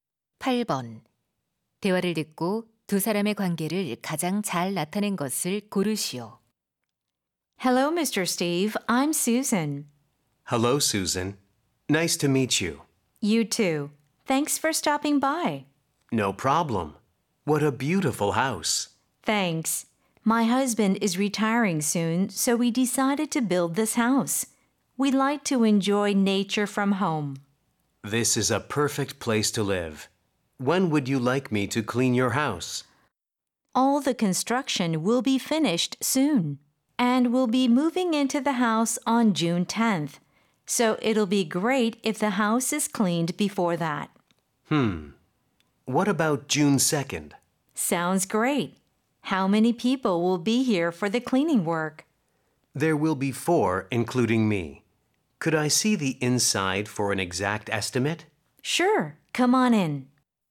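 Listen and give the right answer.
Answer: 집주인 - 청소 업체 직원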